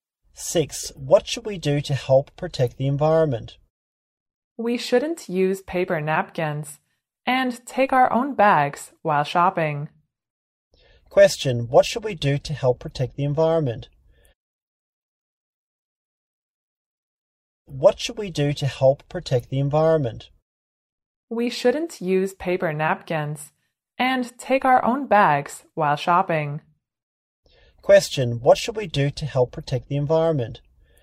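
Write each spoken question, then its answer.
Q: Question, what should we do to help protect the environment?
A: Stop using paper napkins and take our own bags while shopping.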